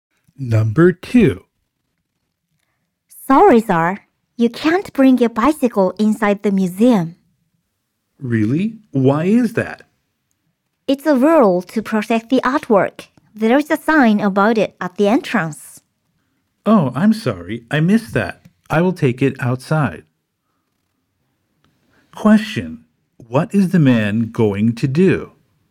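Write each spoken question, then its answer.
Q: What is the man going to do?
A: Take his bicycle outside.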